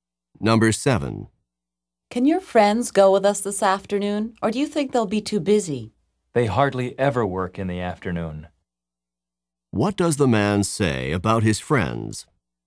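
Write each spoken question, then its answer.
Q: What does the man say about his friends?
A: They will probably be free; they rarely work in the afternoon.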